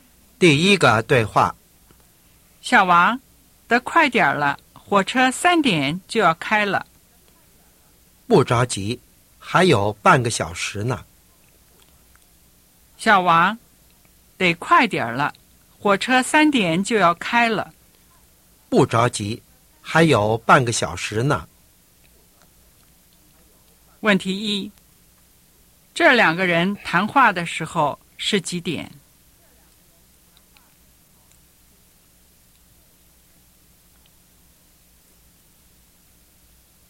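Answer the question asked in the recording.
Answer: 两点半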